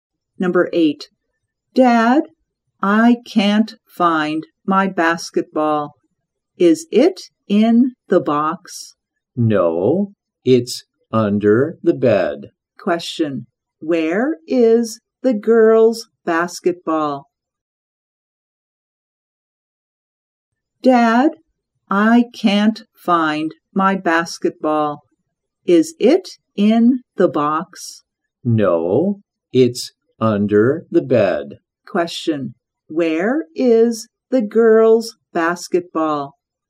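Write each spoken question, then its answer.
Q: where is the girl's basketball?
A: Under the bed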